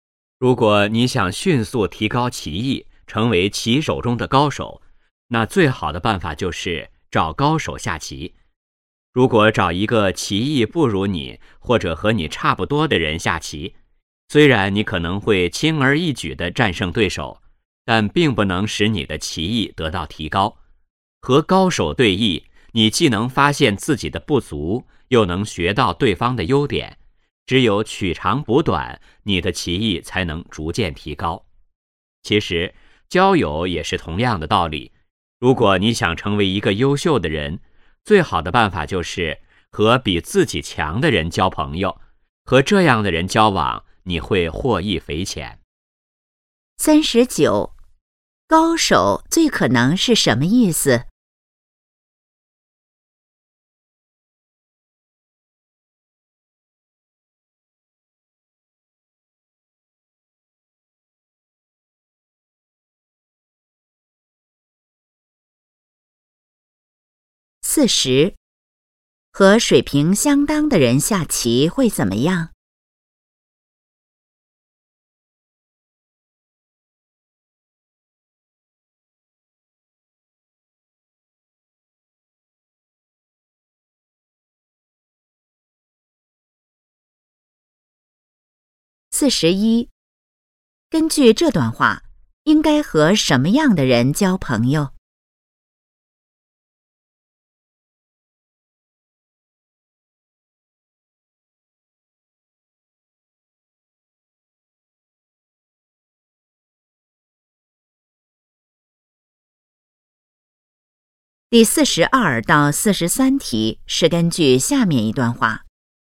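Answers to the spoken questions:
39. 技艺高超的人
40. 棋艺得不到提高
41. 比自己强的人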